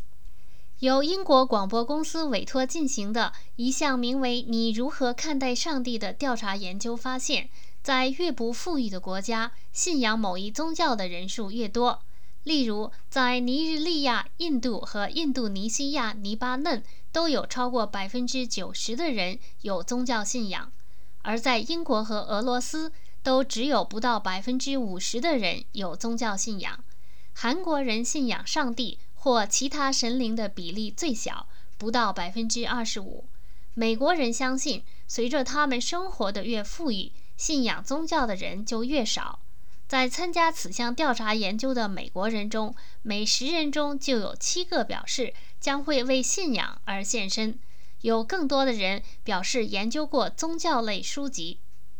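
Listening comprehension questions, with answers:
Please answer the following questions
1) 国家的富裕程度对人们的宗教信仰有什么影响?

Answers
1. 越不富裕的国家,信仰某一宗教的人数越多。

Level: 3rd Year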